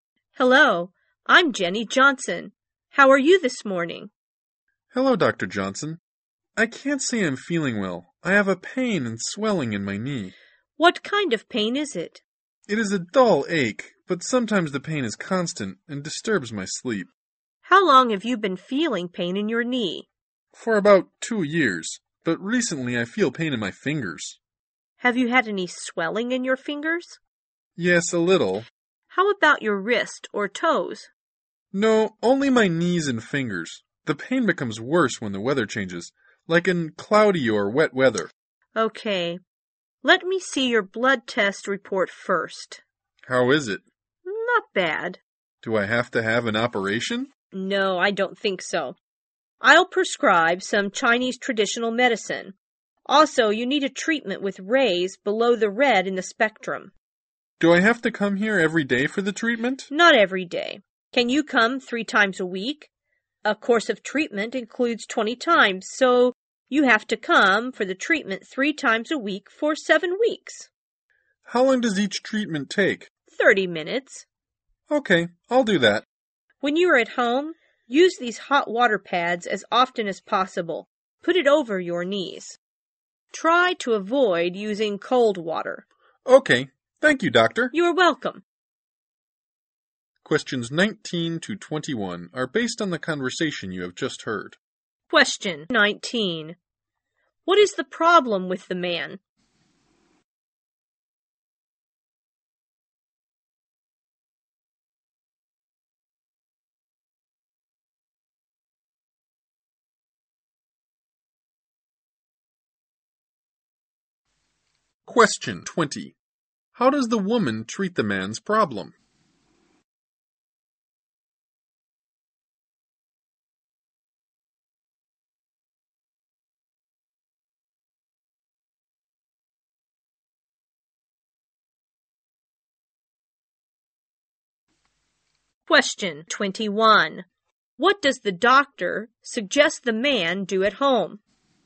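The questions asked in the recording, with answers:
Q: What is the problem with the man?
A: He has pain and swelling in his knees and fingers

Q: How does the woman treat the man's problem?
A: With Chinese traditional medicine and infrared ray treatment

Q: What does the doctor suggest the man do at home?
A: Put hot water pads on his knees and avoid cold water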